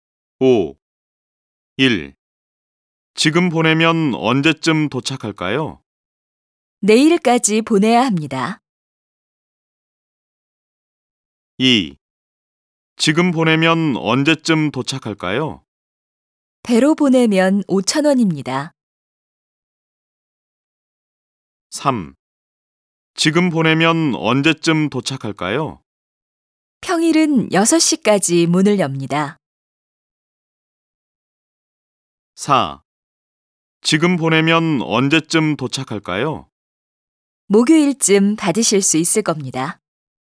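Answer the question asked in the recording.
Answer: 4: 목요일쯤 받으실 수 있을 겁니다.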